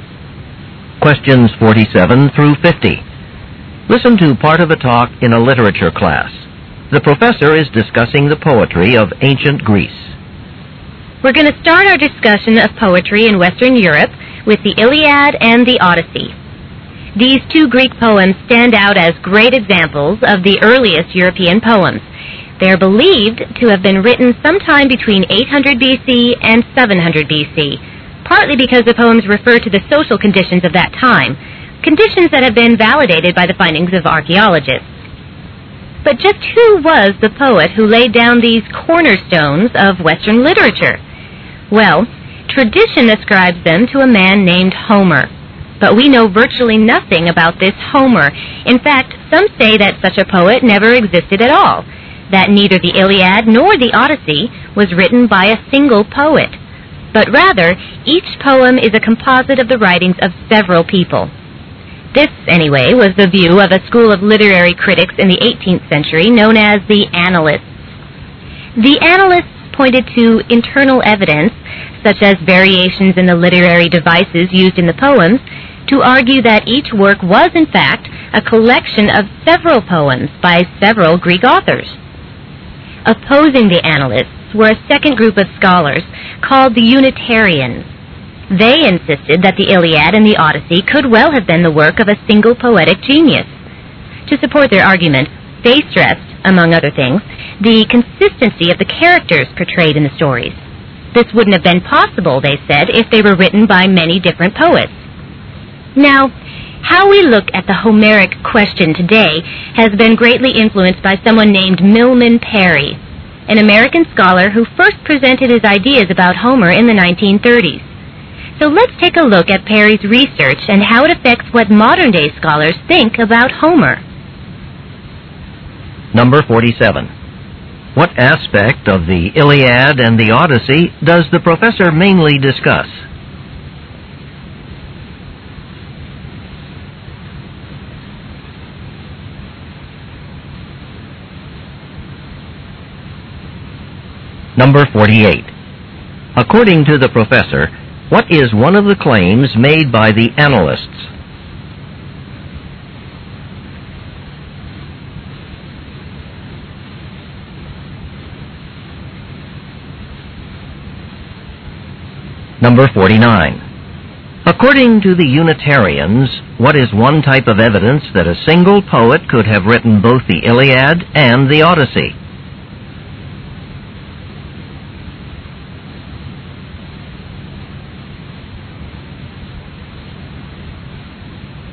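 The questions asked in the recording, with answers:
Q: What aspect of the Iliad and the Odyssey does the professor mainly discuss?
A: Who wrote them

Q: According to the professor, what is one of the claims made by the Annalists?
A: Each poem was a collection of poems by several authors

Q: According to the Unitarians, what is one type of evidence that a single poet could have written both the Iliad and the Odyssey?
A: The consistency of the characters

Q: What will the professor probably talk about next?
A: Milman Perry's research on Homer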